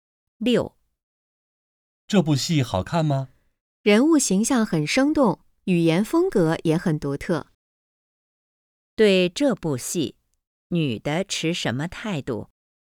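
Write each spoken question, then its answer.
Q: 对这部戏,女的持什么态度?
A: 肯定、欣赏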